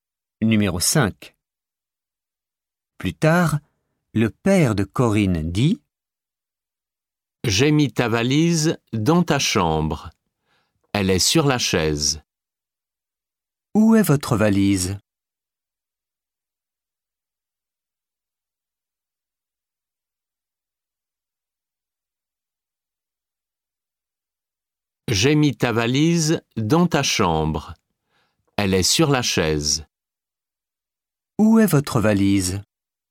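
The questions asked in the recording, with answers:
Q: Où est votre valise ?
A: Dans votre chambre, sur la chaise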